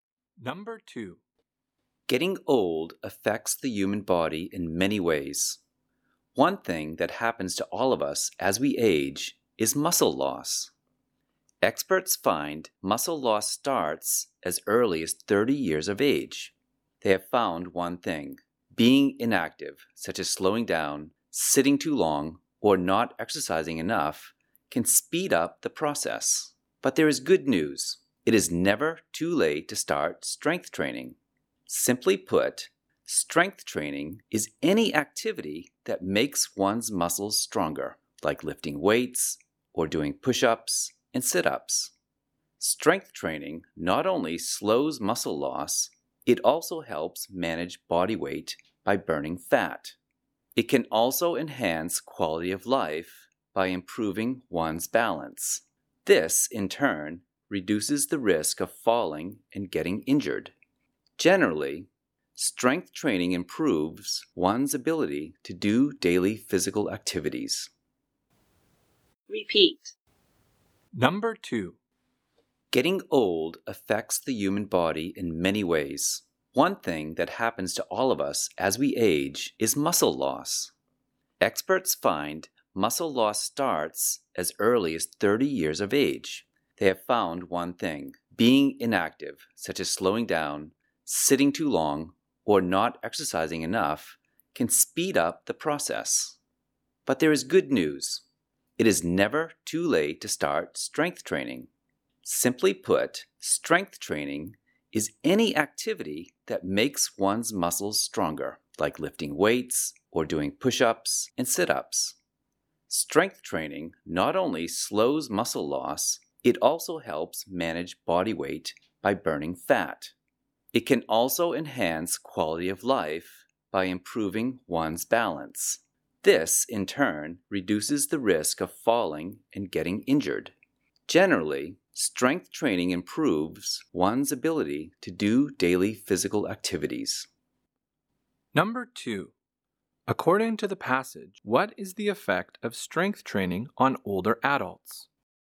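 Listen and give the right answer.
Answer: It slows muscle loss, helps control weight, and improves balance, which lowers the risk of falls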